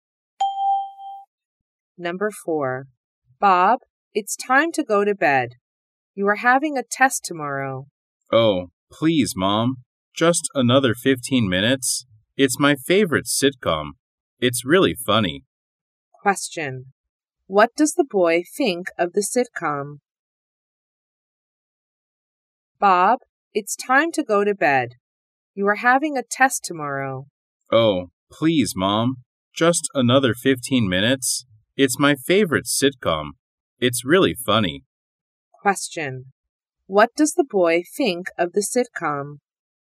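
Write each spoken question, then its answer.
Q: What does the boy think of the sitcom?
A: It's really funny.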